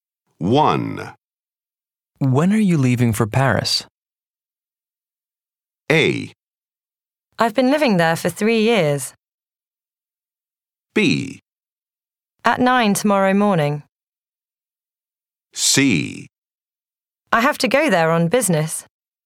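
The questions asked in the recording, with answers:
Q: When are you leaving for Paris?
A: B: At 9 tomorrow morning.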